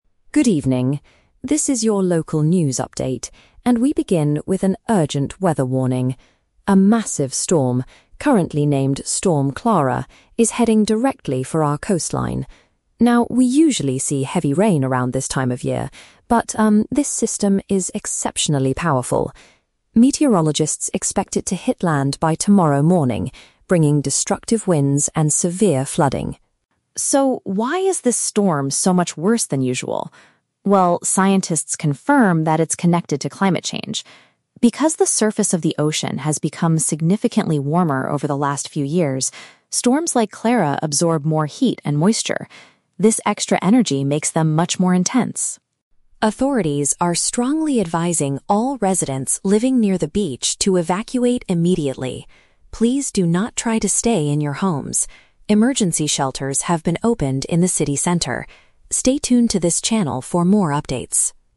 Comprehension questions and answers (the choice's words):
Listen to a TV news report about an approaching storm and choose the correct answer (A, B, or C) for each question.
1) What makes Storm Clara different from typical weather at this time of year?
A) It is bringing heavy rain but no wind.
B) It is unusually strong and severe.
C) It is expected to last for several weeks.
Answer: It is unusually strong and severe.

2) According to the report, what is the main reason for the storm's high intensity?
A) The temperature of the sea water has risen.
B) The city center is producing too much heat.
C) Two separate storm systems have joined together.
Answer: The temperature of the sea water has risen.

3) What are people living near the coast advised to do?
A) To stay securely inside their houses.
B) To prepare their boats for the flood.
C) To leave the area and go to a shelter.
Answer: To leave the area and go to a shelter.

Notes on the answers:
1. The anchor states that while heavy rain is normal, "this system is exceptionally powerful" and "much worse than usual." (Paraphrasing: unusually strong and severe = exceptionally powerful / much worse than usual). Why the trap is wrong: Option (A) is the trap. The anchor mentions they usually see "heavy rain," but Storm Clara is also bringing "destructive winds," so saying it has "no wind" is incorrect. Option (C) is a plausible guess for a storm, but its duration is never mentioned.
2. The report explains that the storm is worse because "the surface of the ocean has become significantly warmer." (Paraphrasing: temperature of the sea water has risen = surface of the ocean has become significantly warmer). Why the trap is wrong: Option (B) is a trap. The "city center" is mentioned in the audio, but it is the location of the emergency shelters, not the cause of the heat. Option (C) is unmentioned.
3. Authorities advise residents near the beach to "evacuate immediately" because "emergency shelters have been opened." (Paraphrasing: leave the area = evacuate). Why the trap is wrong: Option (A) is a very strong trap. The anchor says, "Stay tuned to this channel," which might make people think they should stay home, but he explicitly warns: "Please do not try to stay in your homes." Option (B) is unmentioned.

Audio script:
News Anchor: Good evening. This is your local news update, and we begin with an urgent weather warning. A massive storm, currently named Storm Clara, is heading directly for our coastline. Now, we usually see heavy rain around this time of year, but um, this system is exceptionally powerful. Meteorologists expect it to hit land by tomorrow morning, bringing destructive winds and severe flooding.
So, why is this storm so much worse than usual? Well, scientists confirm that it's connected to climate change. Because the surface of the ocean has become significantly warmer over the last few years, storms like Clara absorb more heat and moisture. This extra energy makes them much more intense.
Authorities are strongly advising all residents living near the beach to evacuate immediately. Please do not try to stay in your homes. Emergency shelters have been opened in the city center. Stay tuned to this channel for more updates.